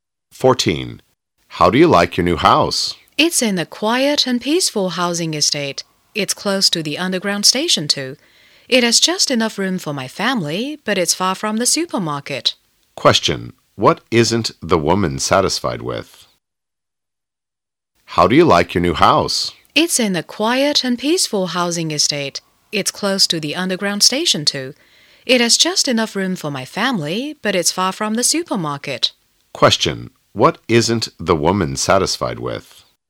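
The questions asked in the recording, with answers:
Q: What isn't the woman satisfied with?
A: Her new house is far from the supermarket.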